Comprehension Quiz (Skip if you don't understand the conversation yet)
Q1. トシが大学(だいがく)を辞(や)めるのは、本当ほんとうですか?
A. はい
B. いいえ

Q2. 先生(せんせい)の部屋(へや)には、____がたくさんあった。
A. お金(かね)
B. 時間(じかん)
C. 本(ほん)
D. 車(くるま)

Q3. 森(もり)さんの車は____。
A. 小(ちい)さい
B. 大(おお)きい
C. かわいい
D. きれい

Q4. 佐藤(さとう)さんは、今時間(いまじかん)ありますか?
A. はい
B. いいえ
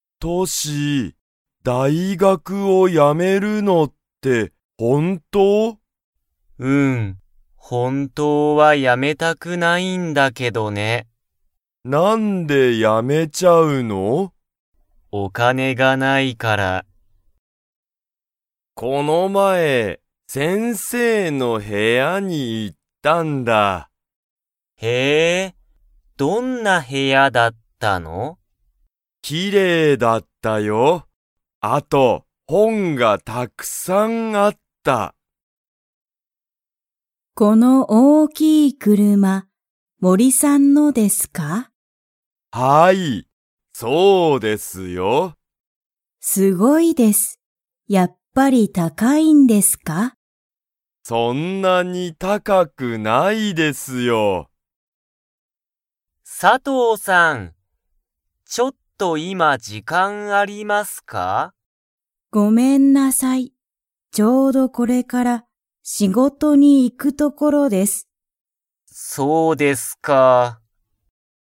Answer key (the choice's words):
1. はい
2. 本(ほん)
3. 大(おお)きい
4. いいえ

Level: Level 1